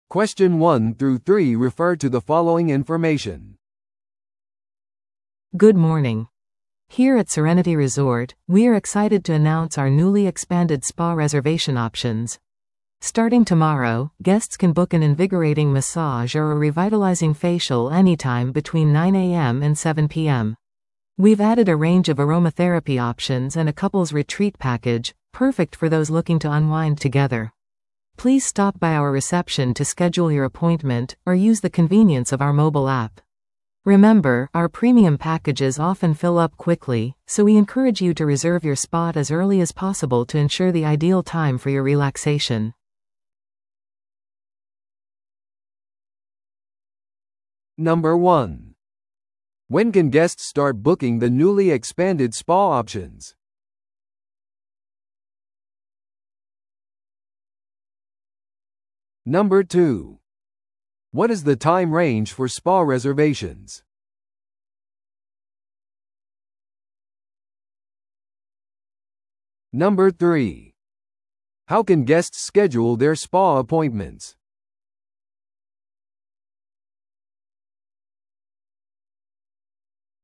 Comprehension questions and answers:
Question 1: When can guests start booking the newly expanded spa options?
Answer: 明日

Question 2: What is the time range for spa reservations?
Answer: 朝9時から夜7時まで

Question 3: How can guests schedule their spa appointments?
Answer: フロントを訪れるかモバイルアプリを利用する

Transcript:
Good morning! Here at Serenity Resort, we are excited to announce our newly expanded spa reservation options. Starting tomorrow, guests can book an invigorating massage or a revitalizing facial anytime between 9am and 7pm. We've added a range of aromatherapy options and a couple's retreat package, perfect for those looking to unwind together. Please stop by our reception to schedule your appointment, or use the convenience of our mobile app. Remember, our premium packages often fill up quickly, so we encourage you to reserve your spot as early as possible to ensure the ideal time for your relaxation.